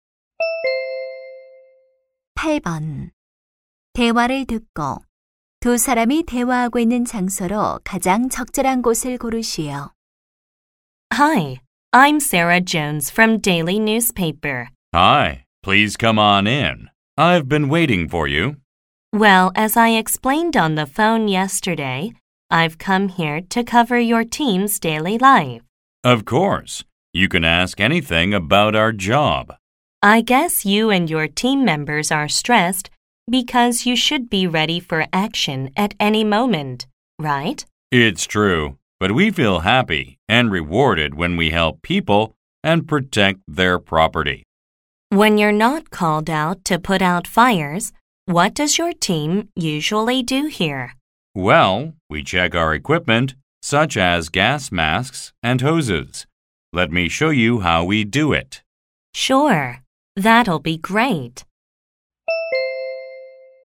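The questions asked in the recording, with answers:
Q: 대화를 듣고 두 사람이 대화하고 있는 장소로 가장 적절한 곳을 고르시오.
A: 소방서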